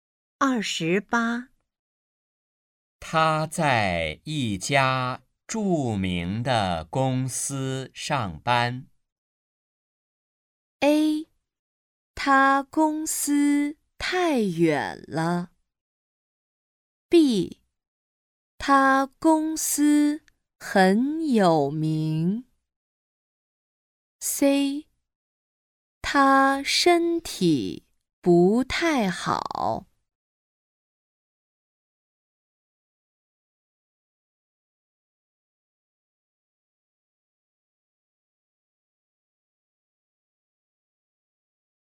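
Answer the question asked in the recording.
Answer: B: 他公司很有名。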